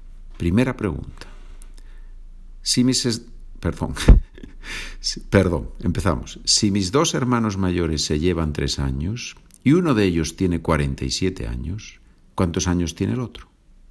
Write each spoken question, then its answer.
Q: Si mis dos hermanos mayores se llevan 3 años y uno de ellos tiene 47 años, ¿cuántos años tiene el otro?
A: Una posibilidad es que tenga 50 años.